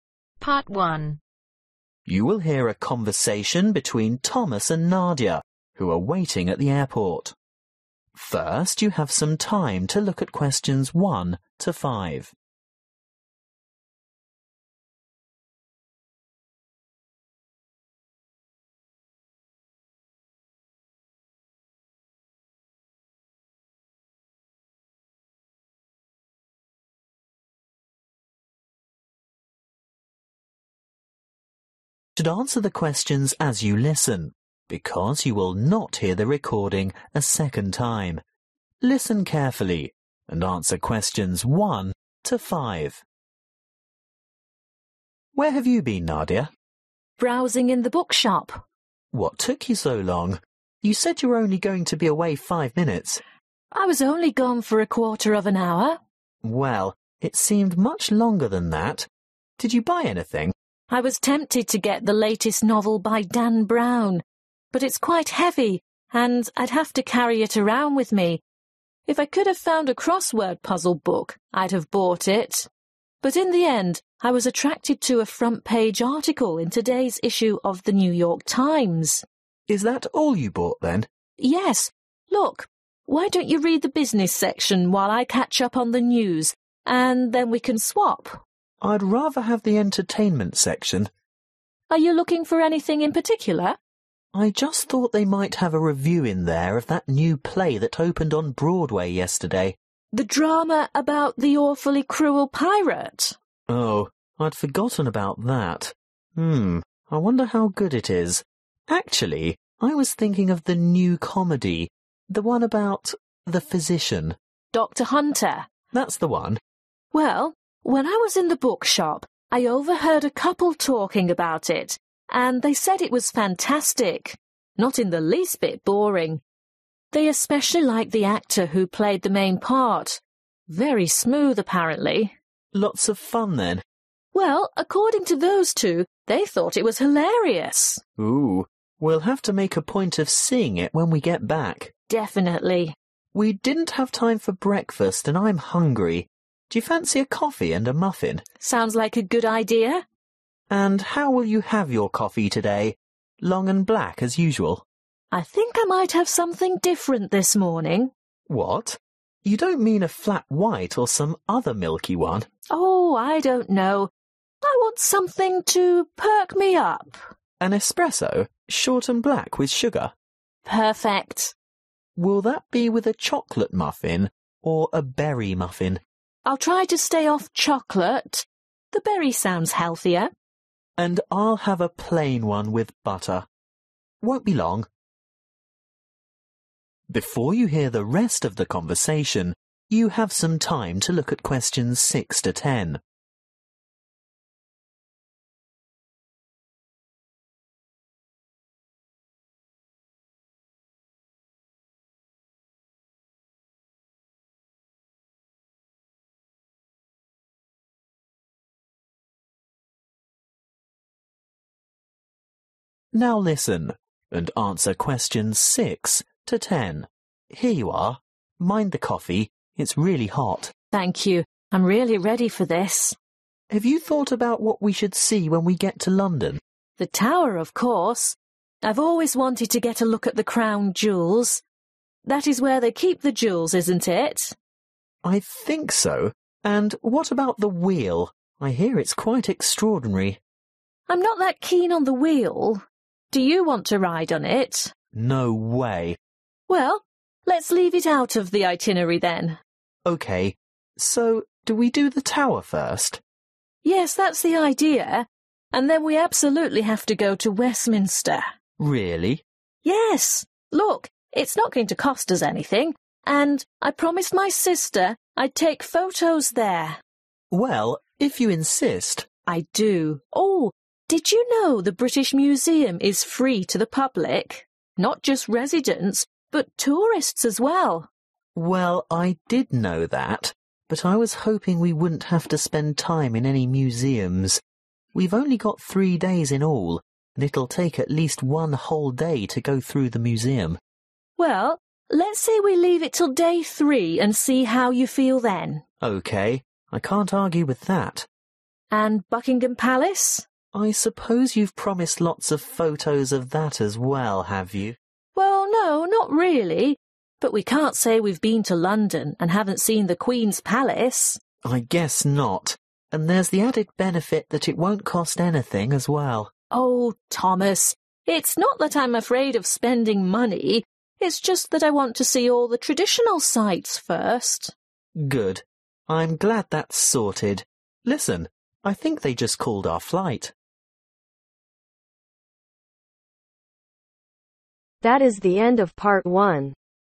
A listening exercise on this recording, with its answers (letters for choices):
Choose the correct letter A , B or C.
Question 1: What did Nadia buy at the bookshop ?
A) a newspaper.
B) a novel.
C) crossword puzzles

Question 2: Thomas is interested in the play about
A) a hunter.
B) a pirate.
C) a doctor.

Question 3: The couple in the bookshop were discussing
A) a funny play.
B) a smooth play.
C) a boring play.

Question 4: How does Nadia want her coffee ?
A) sweet and black.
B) with milk.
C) black with no sugar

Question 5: What kind of muffin does Nadia want ?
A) plain.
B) berry.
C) chocolate.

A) they will definitely visit.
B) they might visit.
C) they will not visit.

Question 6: The Tower of London ............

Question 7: The Wheel ............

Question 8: Westminster ............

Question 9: The British Museum ............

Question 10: Buckingham Palace ............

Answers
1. A
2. C
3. A
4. A
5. B
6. A
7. C
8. A
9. B
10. A